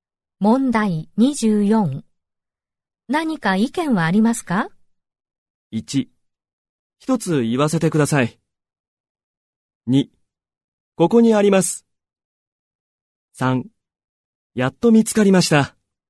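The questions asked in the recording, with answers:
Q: 何か意見はありますか?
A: 1: 一つ言わせてください。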